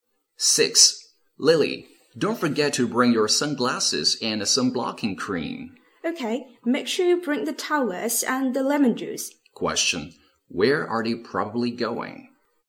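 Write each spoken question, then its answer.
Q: Where are they probably going?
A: To the beach.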